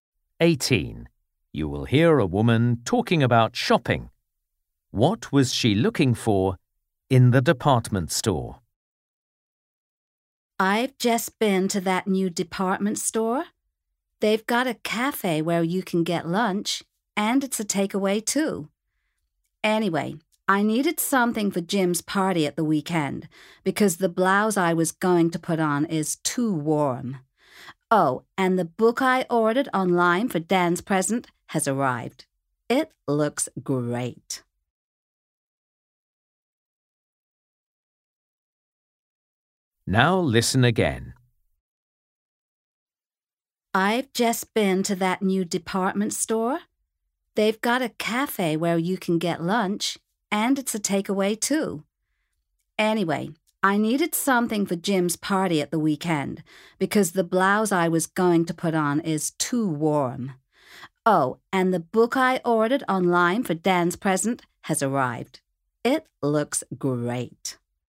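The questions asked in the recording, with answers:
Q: What was she looking for in the department store?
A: Something to wear to Jim's party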